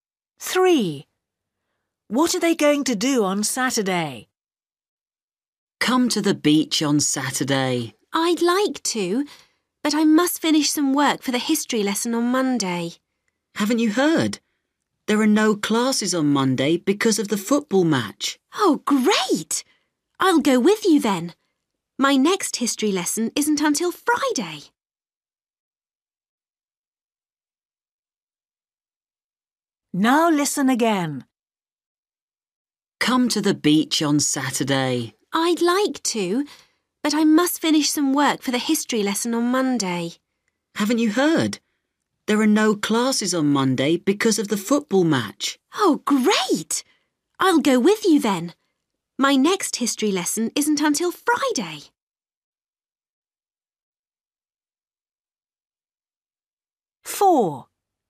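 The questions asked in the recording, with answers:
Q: What are they going to do on Saturday?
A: Go to the beach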